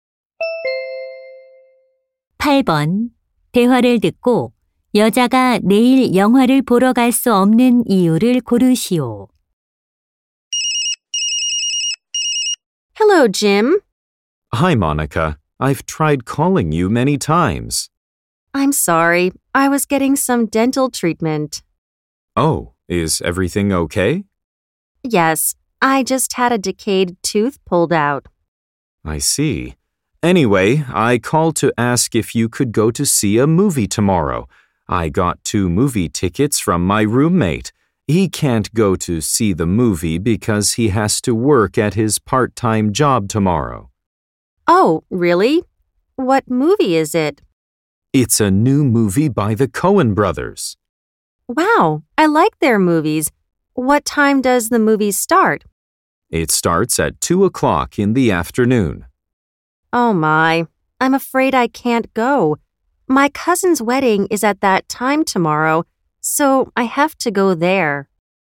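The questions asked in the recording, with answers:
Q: 대화를 듣고 여자가 내일 영화를 보러 갈 수 없는 이유를 고르시오.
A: 사촌의 결혼식에 가야 해서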